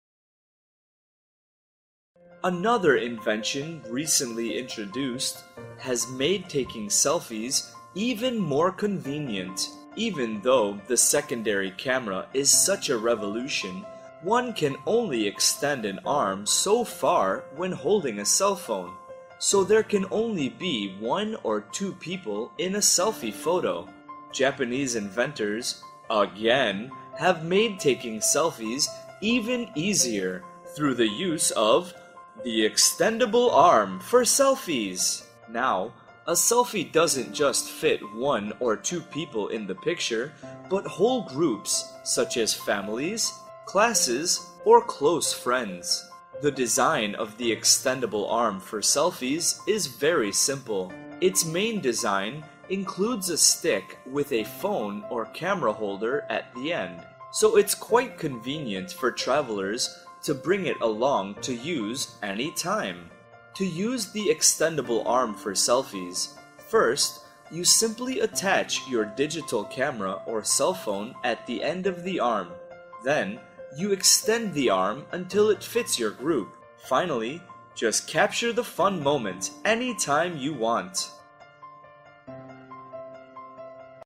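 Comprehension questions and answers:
Task: Complete the sentences.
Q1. The extendable arm helps people take ________ photos.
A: group

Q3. The arm includes a stick with a ________ holder at the end.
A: phone or camera

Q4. To use it, attach your ________ or camera and extend the arm.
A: cell phone

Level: lớp 8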